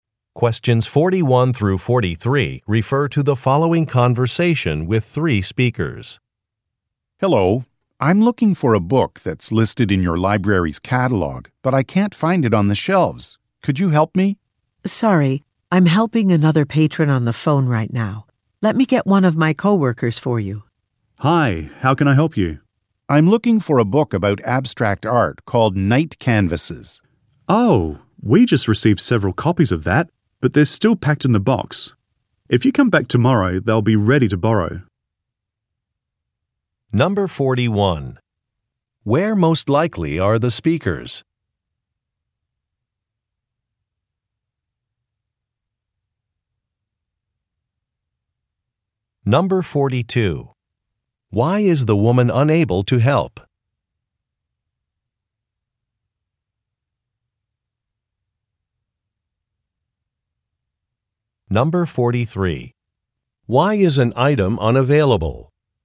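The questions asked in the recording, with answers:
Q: Where most likely are the speakers?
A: At a library

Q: Why is the woman unable to help?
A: She is helping another patron on the phone

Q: Why is an item unavailable?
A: The copies are still packed in a box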